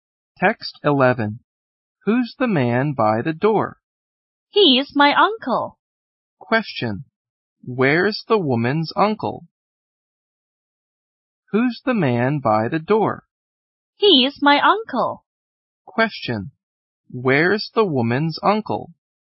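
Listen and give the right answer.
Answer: By the door.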